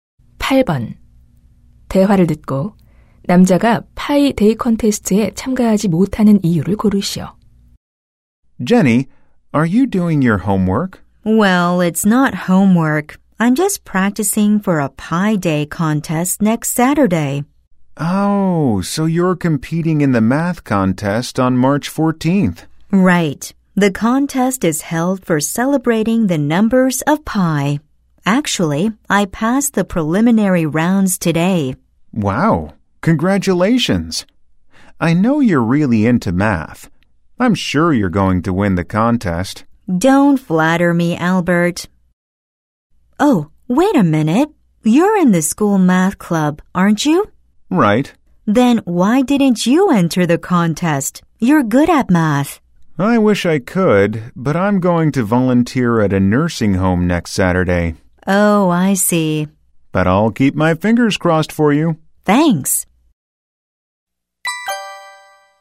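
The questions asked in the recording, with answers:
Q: 대화를 듣고 남자가 파이 데이 콘테스트에 참가하지 못하는 이유를 고르시오.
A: 요양원에서 봉사활동을 해야 해서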